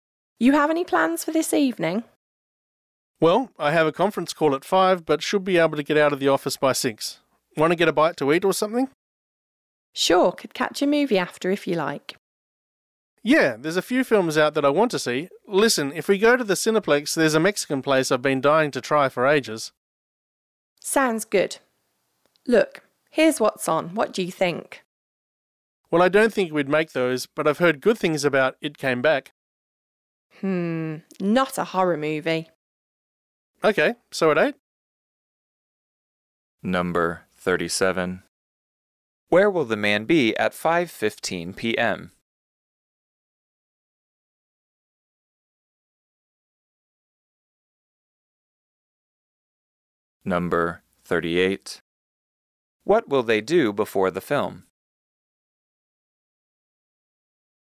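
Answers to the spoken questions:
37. In his office, on a conference call
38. Eat at a Mexican restaurant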